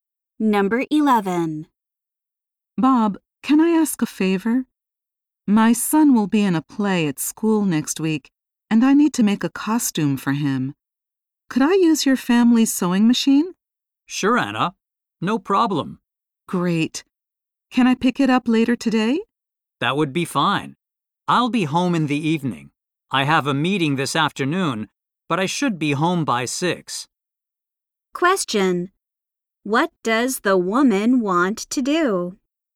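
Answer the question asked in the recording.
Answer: Borrow Bob's family's sewing machine.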